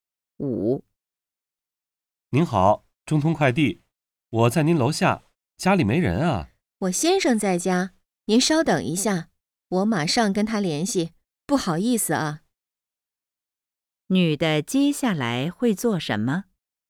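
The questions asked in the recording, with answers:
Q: 女的接下来会做什么?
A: 联系她先生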